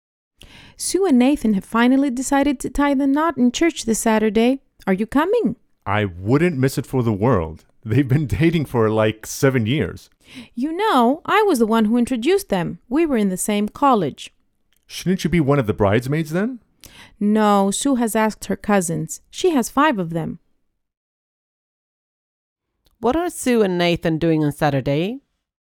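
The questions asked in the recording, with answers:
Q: What are Sue and Nathan doing on Saturday?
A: Getting married in church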